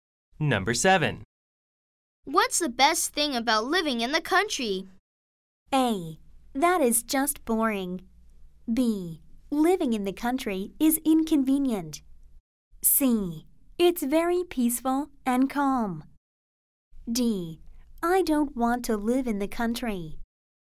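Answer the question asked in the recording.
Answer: C: It's very peaceful and calm.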